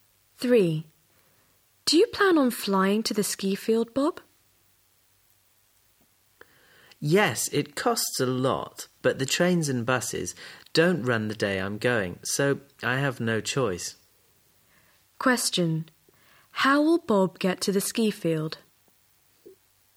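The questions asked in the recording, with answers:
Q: How will Bob get to the ski field?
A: By plane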